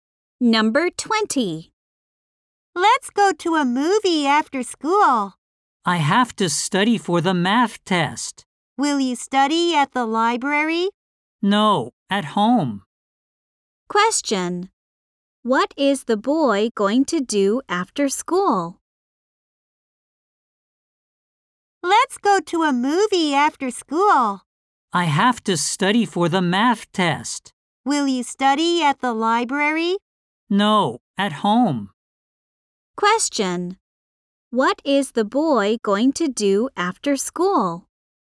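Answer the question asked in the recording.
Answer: Study for the math test at home.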